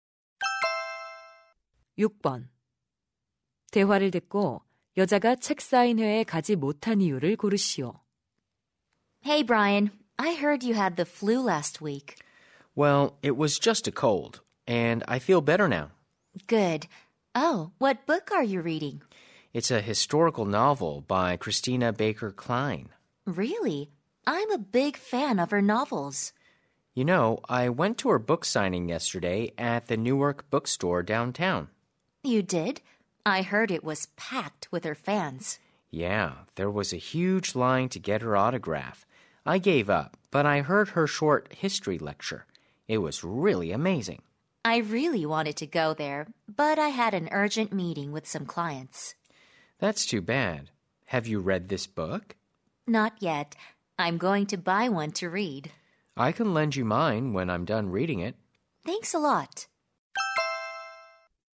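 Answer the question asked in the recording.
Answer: 고객들과 급한 회의가 있어서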